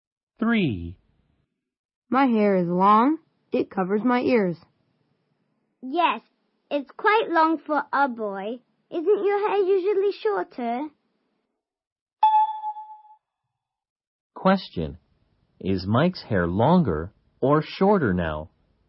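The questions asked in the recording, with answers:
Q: Is Mike's hair longer or shorter now?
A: Longer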